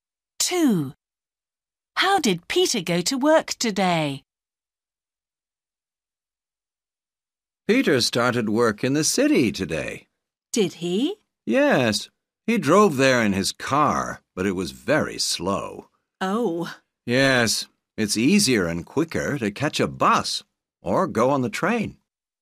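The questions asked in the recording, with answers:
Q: How did Peter go to work today?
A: He drove his car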